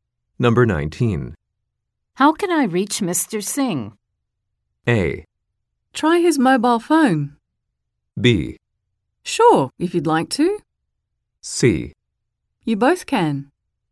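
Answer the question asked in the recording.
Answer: A: Try his mobile phone.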